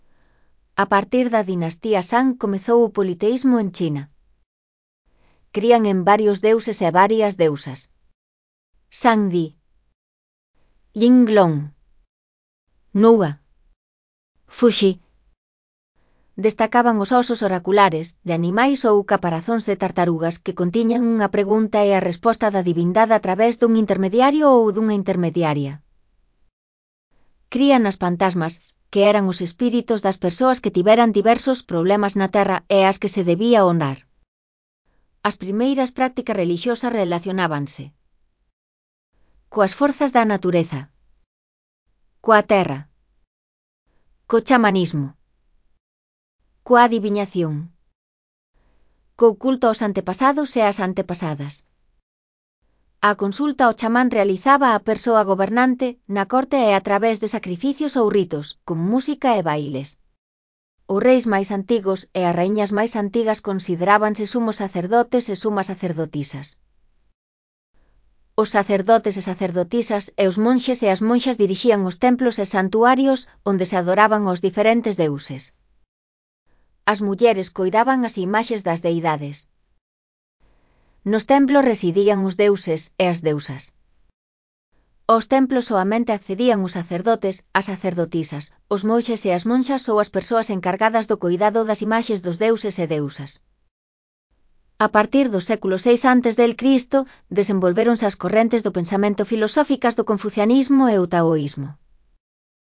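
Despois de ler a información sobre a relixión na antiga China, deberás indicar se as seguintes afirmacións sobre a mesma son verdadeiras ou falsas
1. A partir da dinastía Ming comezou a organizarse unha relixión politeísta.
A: Falso

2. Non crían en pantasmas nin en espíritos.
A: Falso

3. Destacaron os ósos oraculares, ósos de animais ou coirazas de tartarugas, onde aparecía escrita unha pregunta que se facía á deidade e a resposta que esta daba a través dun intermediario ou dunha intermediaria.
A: Verdadeiro

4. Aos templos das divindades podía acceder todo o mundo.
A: Falso

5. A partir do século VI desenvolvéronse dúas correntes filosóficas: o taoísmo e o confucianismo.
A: Verdadeiro

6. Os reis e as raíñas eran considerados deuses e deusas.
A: Falso

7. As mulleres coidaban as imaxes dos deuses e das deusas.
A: Verdadeiro

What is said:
• A partir da dinastía Shang comezou o politeísmo en China.
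• Crían en varios deuses e varias deusas:
• Fuxi.
• Destacaban os ósos oraculares, de animais ou coirazas de tartarugas, que contiñan unha pregunta e a resposta da divindade a través dun intermediario ou dunha intermediaria.
• Crían nas pantasmas, que eran os espíritos das persoas que tiveran diversos problemas na terra e ás que se debía honrar.
• As primeiras prácticas relixiosas relacionábanse:
• Coas forzas da natureza.
• Coa terra.
• Co culto aos antepasados e ás antepasadas.
• A consulta ao xamán realizábaa a persoa gobernante, na corte e a través de sacrificios ou ritos, con música e bailes.
• Os reis máis antigos e as raíñas máis antigas considerábanse sumos sacerdotes e sumas sacerdotisas.
• Os sacerdotes e sacerdotisas e os monxes e as monxas dirixían os templos e santuarios, onde se adoraban aos diferentes deuses.
• As mulleres coidaban as imaxes das deidades.
• Nos templos residían os deuses e as deusas.
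• Aos templos soamente accedían os sacerdotes, as sacerdotisas, os monxes e as monxas ou as persoas encargadas do coidado das imaxes dos deuses e deusas.
• A partir do século VI a. desenvolvéronse as correntes do pensamento filosóficas do confucianismo e o taoísmo.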